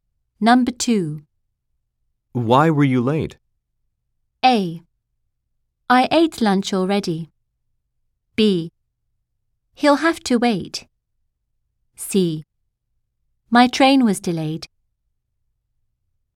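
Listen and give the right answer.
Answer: C: My train was delayed.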